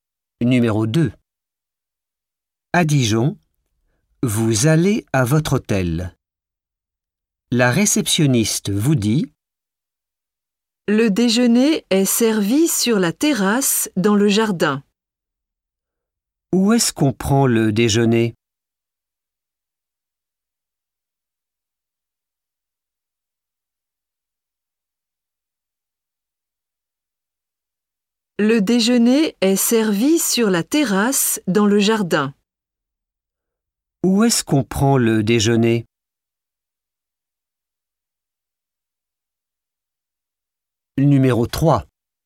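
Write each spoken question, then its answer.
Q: Où est-ce qu'on prend le déjeuner?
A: Sur la terrasse dans le jardin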